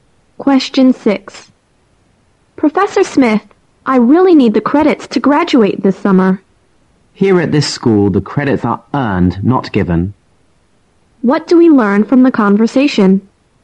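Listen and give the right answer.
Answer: The professor won't give the student credits he hasn't earned.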